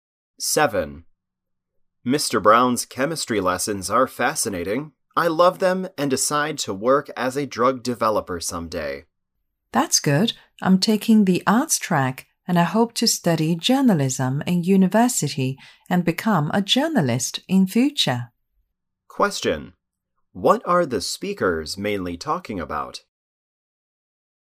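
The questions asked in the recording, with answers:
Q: What are the speakers mainly talking about?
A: Their future careers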